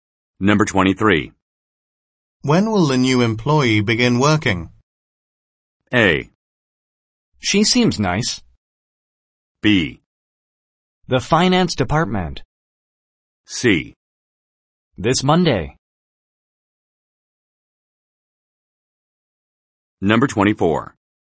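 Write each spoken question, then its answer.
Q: When will the new employee begin working?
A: C: This Monday.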